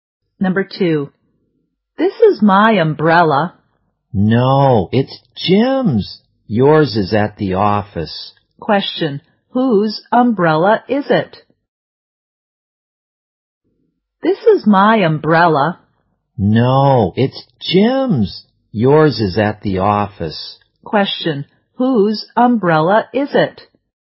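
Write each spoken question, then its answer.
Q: Question. Whose umbrella is it?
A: Jim's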